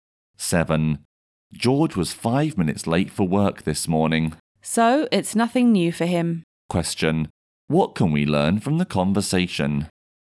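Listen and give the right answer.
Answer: George is often late for work.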